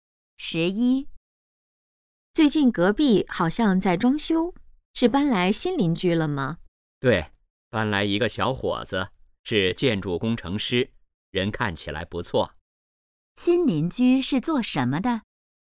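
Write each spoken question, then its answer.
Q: 新邻居是做什么的?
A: 建筑工程师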